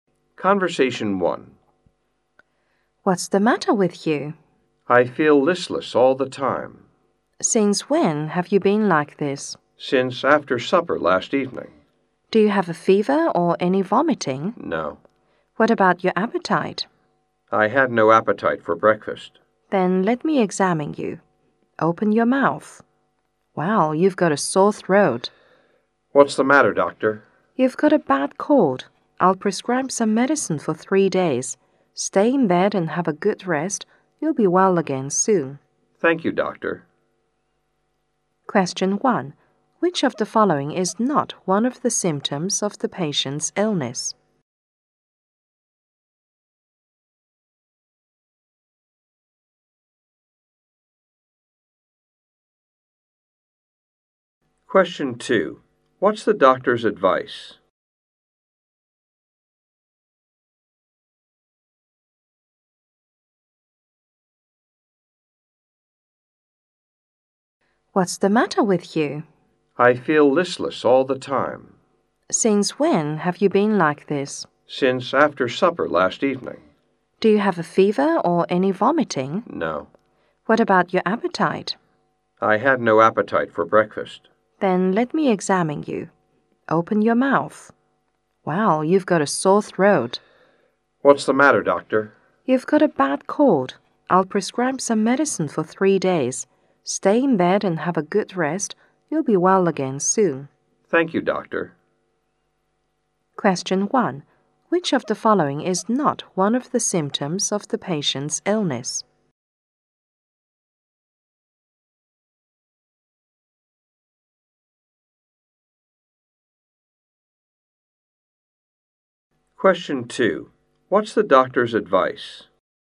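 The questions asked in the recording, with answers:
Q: What's the doctor's advice?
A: Take the medicine for 3 days, stay in bed and have a good rest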